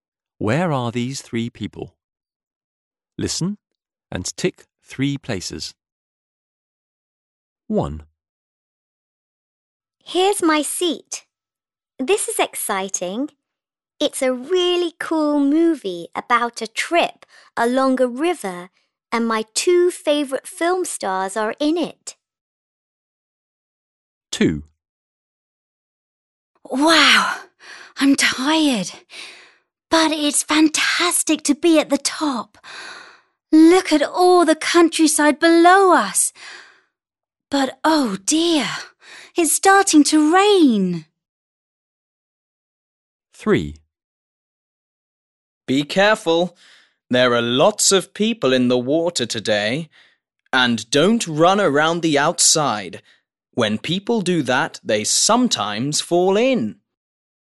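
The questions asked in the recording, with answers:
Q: Where are these three people?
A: at the cinema

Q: Where are these three people?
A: at a swimming pool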